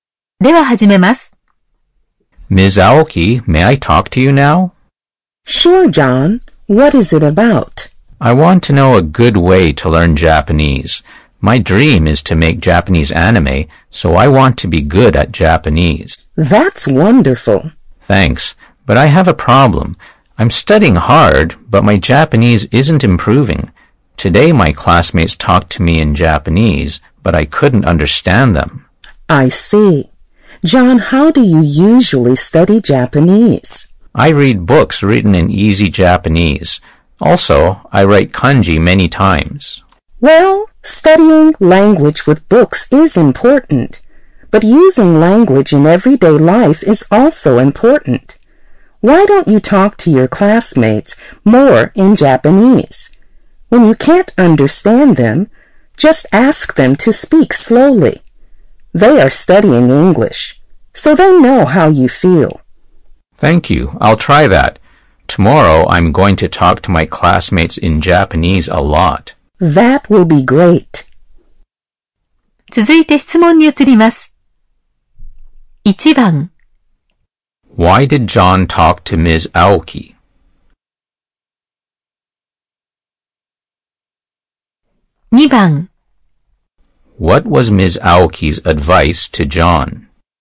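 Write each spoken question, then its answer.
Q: Why did John talk to Ms. Aoki?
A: He wanted to know a good way to learn Japanese.

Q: What was Ms. Aoki's advice to John?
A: To talk to his classmates more in Japanese and ask them to speak slowly when he can't understand.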